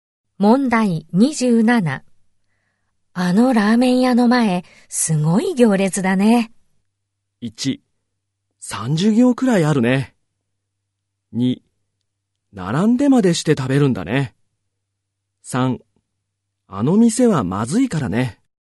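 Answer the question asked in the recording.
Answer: 2: 並んでまでして食べるんだね。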